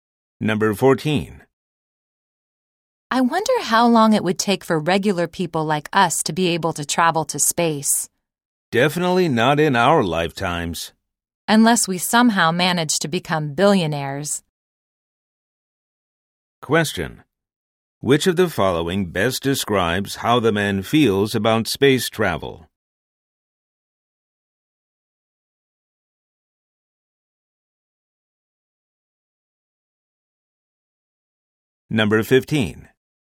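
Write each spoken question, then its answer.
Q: Which of the following best describes how the man feels about space travel?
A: He doesn't think ordinary people will travel to space in their lifetimes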